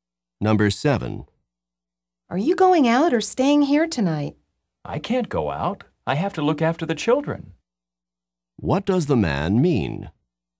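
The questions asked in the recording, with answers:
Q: What does the man mean?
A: He must stay home and take care of the children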